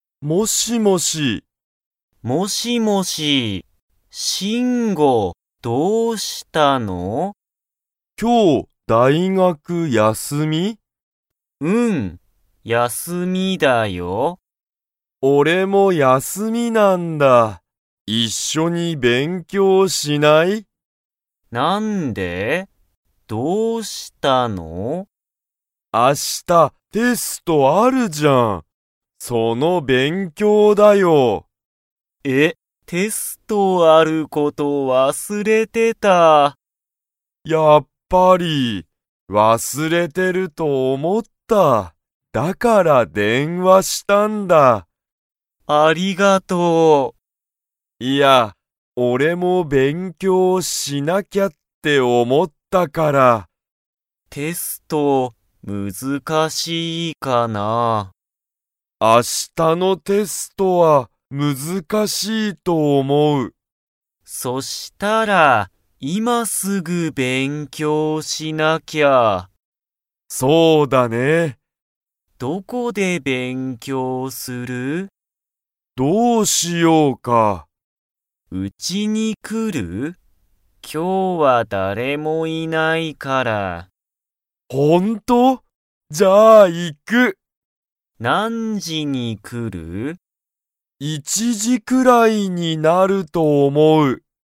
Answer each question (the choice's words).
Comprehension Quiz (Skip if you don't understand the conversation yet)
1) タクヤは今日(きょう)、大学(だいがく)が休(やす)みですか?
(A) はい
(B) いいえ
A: はい

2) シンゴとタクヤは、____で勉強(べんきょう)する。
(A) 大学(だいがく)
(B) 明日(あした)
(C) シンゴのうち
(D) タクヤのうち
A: タクヤのうち

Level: Level 2